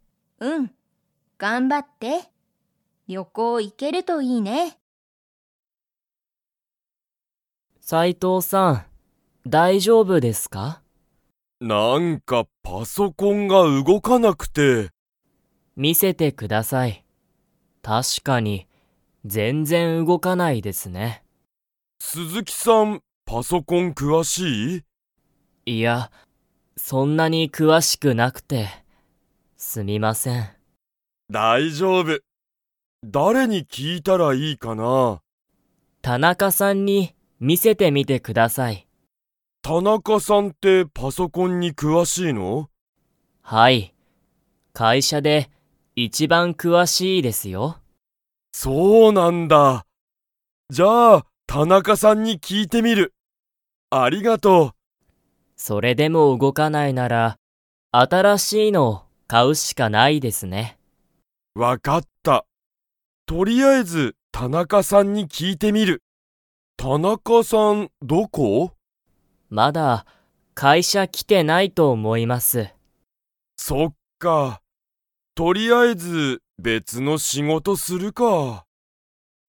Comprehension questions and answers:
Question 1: 鈴木すずきさんはパソコンに 。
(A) 詳くわしい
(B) 詳くわしくない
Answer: (B) 詳くわしくない

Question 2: 斉藤さいとうさんは、パソコンについて誰だれに聞きいてみますか?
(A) 田中たなかさん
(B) 本多ほんださん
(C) 鈴木すずきさん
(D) 小林こばやしさん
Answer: (A) 田中たなかさん

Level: Level 3

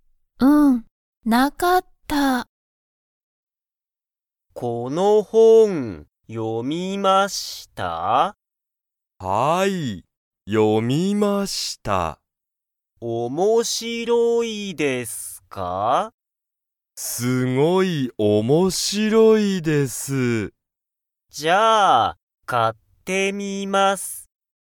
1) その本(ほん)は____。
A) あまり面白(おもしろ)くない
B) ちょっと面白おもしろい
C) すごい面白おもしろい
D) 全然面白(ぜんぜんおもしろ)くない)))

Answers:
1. C) すごい面白おもしろい

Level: Level 1

